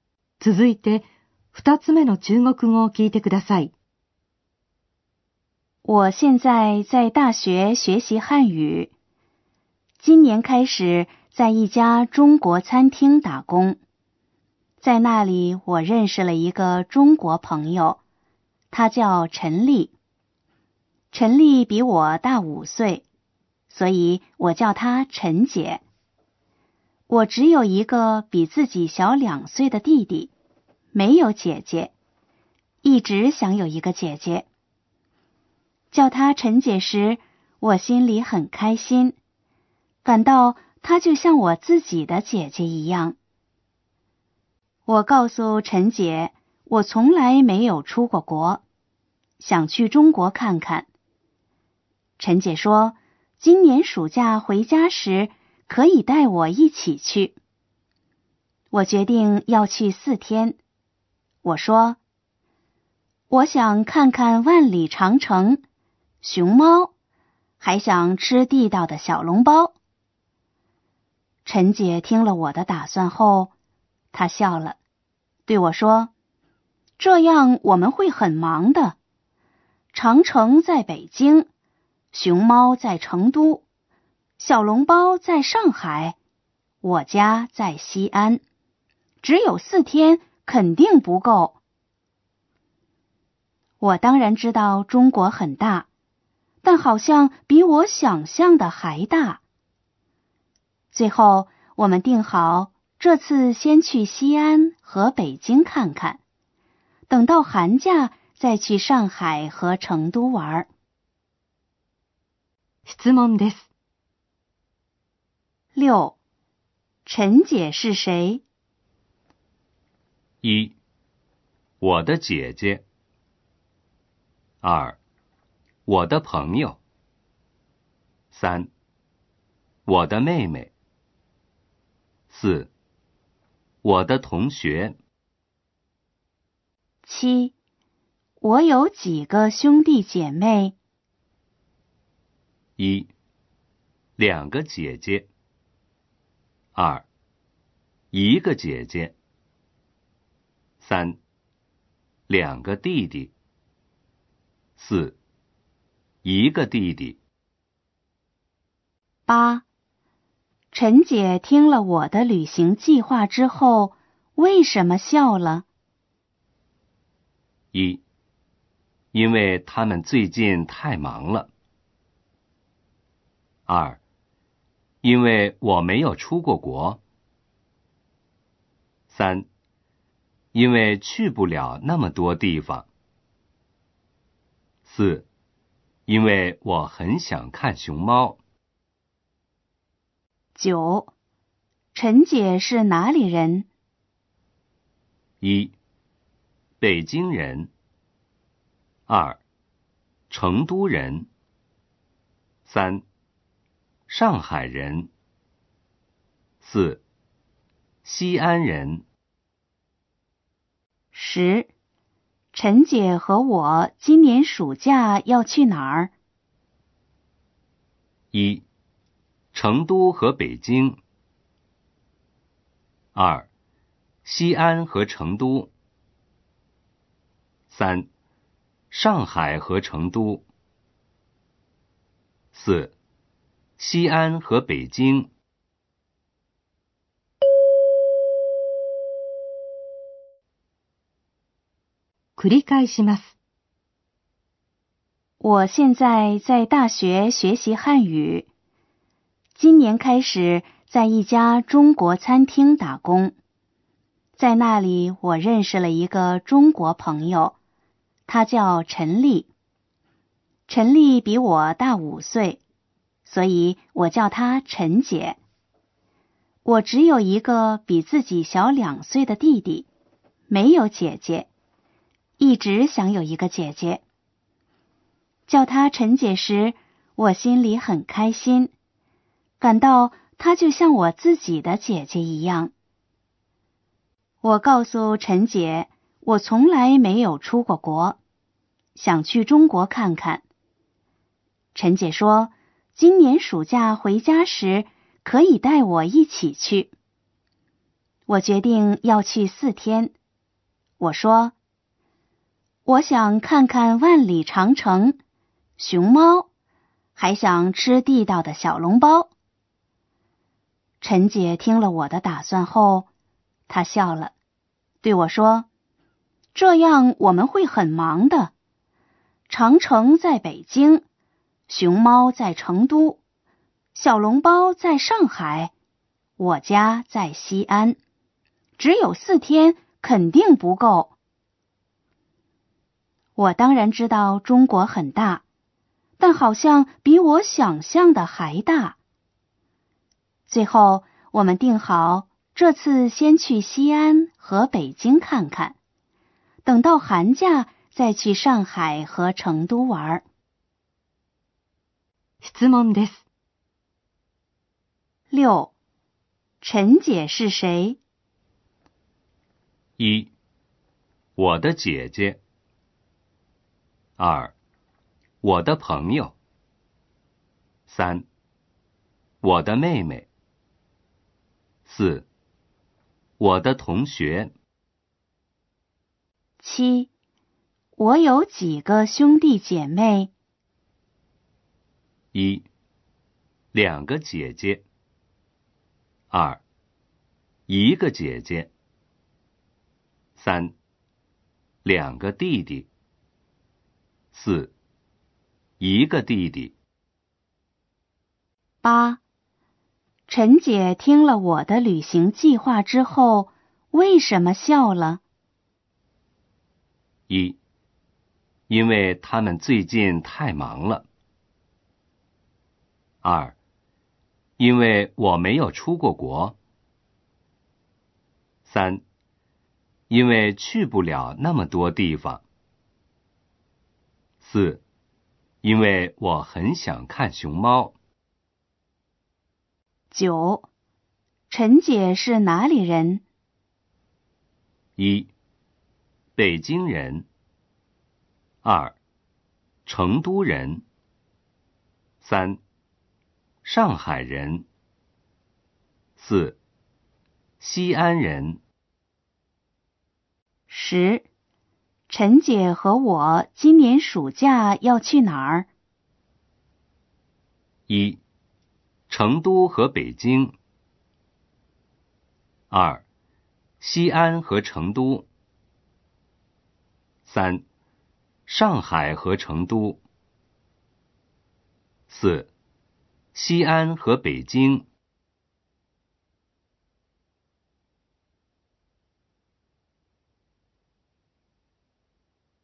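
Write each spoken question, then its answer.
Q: 陈姐是谁?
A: 2: 我的朋友。

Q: 我有几个兄弟姐妹?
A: 4: 一个弟弟。

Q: 陈姐听了我的旅行计划之后,为什么笑了?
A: 3: 因为去不了那么多地方。

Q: 陈姐是哪里人?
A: 4: 西安人。

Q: 陈姐和我今年暑假要去哪儿?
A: 4: 西安和北京。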